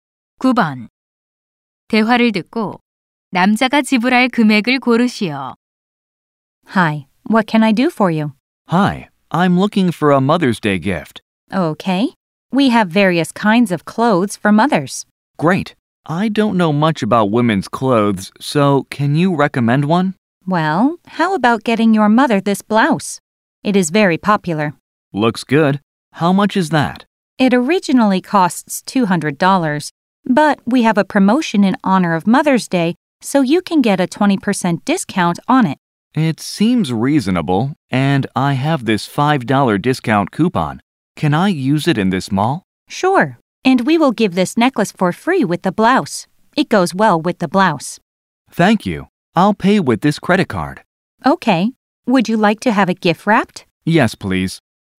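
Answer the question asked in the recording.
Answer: $155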